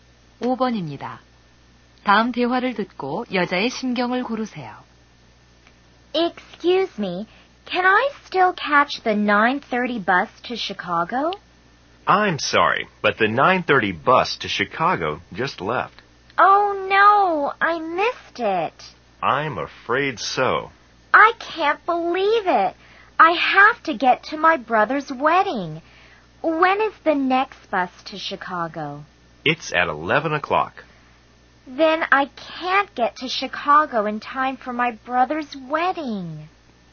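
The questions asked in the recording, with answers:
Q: 다음 대화를 듣고 여자의 심경을 고르세요.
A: 실망함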